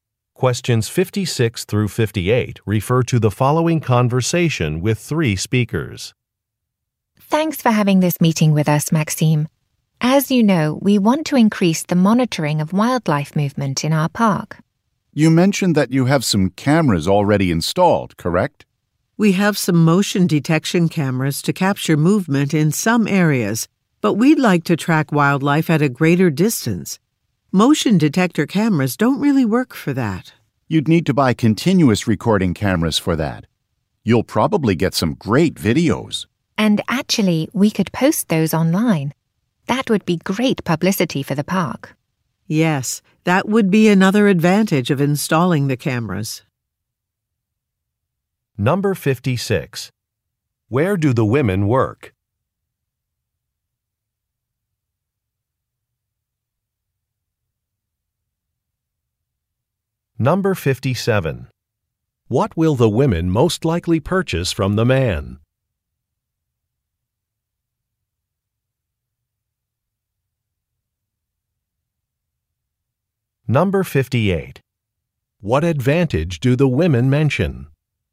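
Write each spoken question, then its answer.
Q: Where do the women work?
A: At a park

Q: What will the women most likely purchase from the man?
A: Continuous recording cameras

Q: What advantage do the women mention?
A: Publicity from posting videos online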